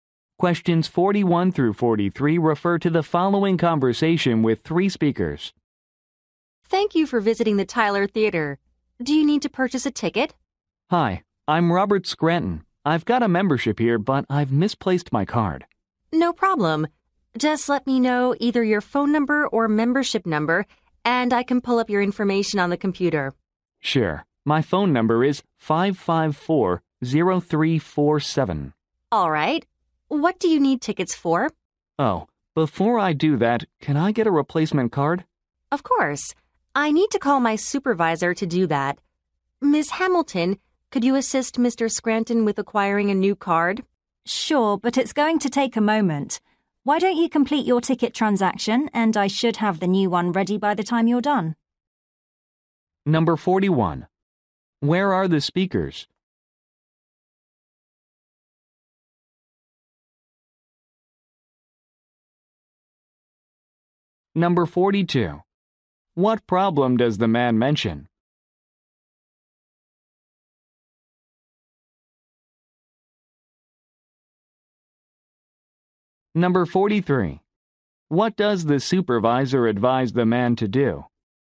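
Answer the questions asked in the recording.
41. At a theater
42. He misplaced his membership card
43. Complete his ticket transaction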